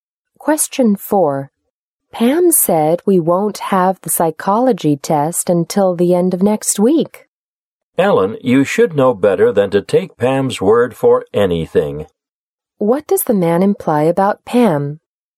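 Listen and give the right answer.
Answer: Pam is not reliable.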